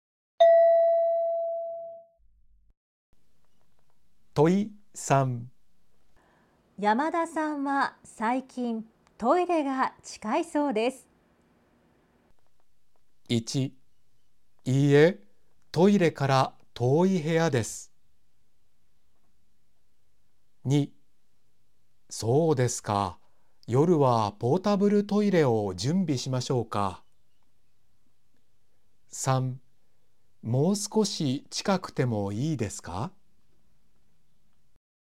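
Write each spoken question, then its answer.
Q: 山田さんは最近トイレが近いそうです。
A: 2: そうですか、夜はポータブルトイレを準備しましょうか。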